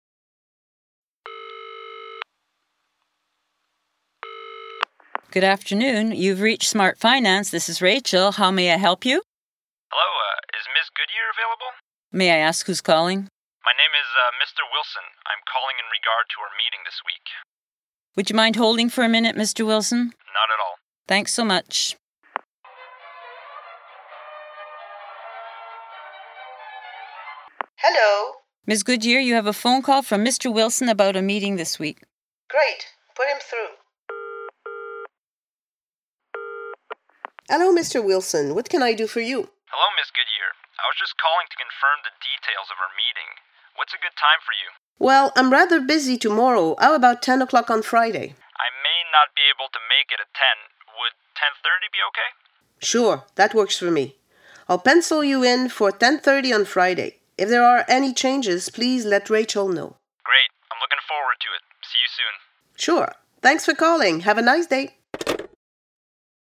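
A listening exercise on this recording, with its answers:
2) Ms. Goodyear has a direct line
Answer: No, calls go through Rachel

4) Why does Rachel put Mr. Wilson on hold?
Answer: To tell Ms. Goodyear about his call and put him through

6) If something comes up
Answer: he should let Rachel know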